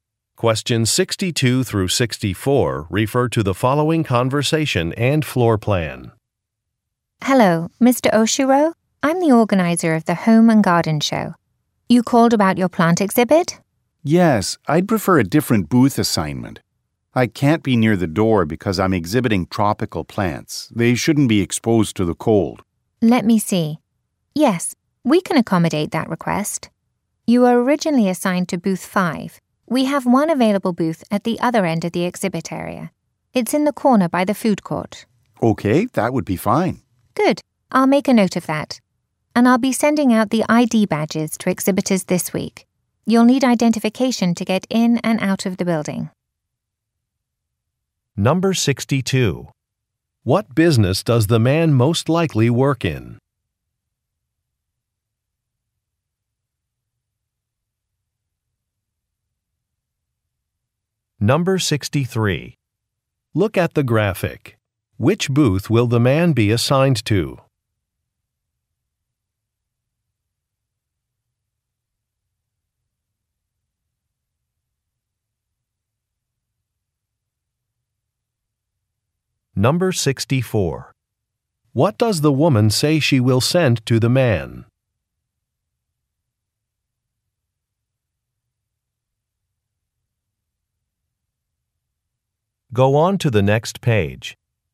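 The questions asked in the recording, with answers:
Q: What business does the man most likely work in?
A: Plants / gardening

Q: What does the woman say she will send to the man?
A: An ID badge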